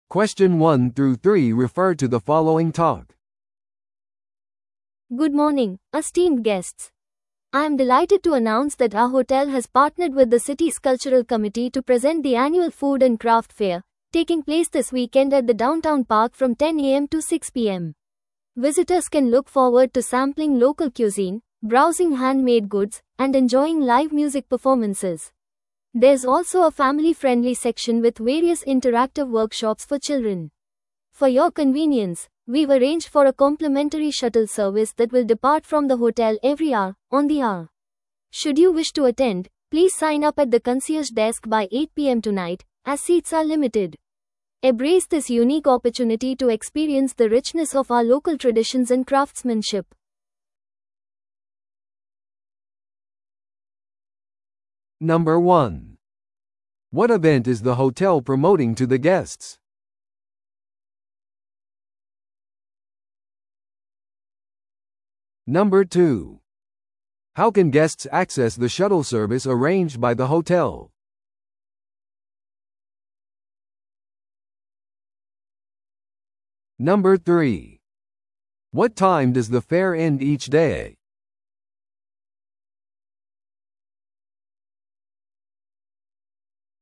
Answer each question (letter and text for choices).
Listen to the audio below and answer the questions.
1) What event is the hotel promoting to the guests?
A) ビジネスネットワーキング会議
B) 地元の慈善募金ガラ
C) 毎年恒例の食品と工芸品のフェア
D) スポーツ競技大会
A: C) 毎年恒例の食品と工芸品のフェア

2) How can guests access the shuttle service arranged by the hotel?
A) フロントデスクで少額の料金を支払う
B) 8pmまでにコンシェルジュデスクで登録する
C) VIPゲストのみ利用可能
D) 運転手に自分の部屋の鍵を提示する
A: B) 8pmまでにコンシェルジュデスクで登録する

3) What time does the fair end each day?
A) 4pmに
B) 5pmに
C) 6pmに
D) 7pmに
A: C) 6pmに

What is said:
Good morning, esteemed guests. I'm delighted to announce that our hotel has partnered with the city's cultural committee to present the annual food and craft fair, taking place this weekend at the downtown park from 10am to 6pm. Visitors can look forward to sampling local cuisine, browsing handmade goods, and enjoying live music performances. There's also a family-friendly section with various interactive workshops for children. For your convenience, we've arranged for a complimentary shuttle service that will depart from the hotel every hour, on the hour. Should you wish to attend, please sign up at the concierge desk by 8pm tonight, as seats are limited. Embrace this unique opportunity to experience the richness of our local traditions and craftsmanship.